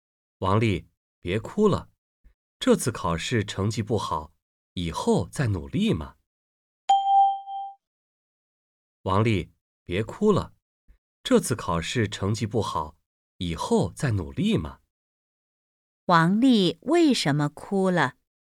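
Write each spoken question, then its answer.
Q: 王丽为什么哭了?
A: 这次考试成绩不好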